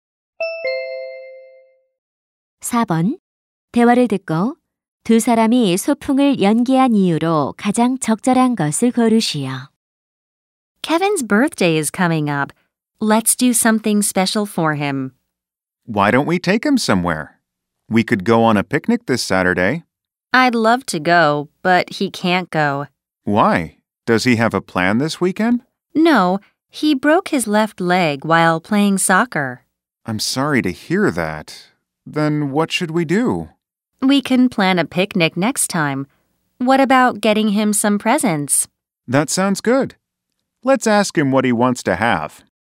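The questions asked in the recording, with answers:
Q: 대화를 듣고 두 사람이 소풍을 연기한 이유로 가장 적절한 것을 고르시오.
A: Kevin이 축구를 하다 왼쪽 다리가 부러져서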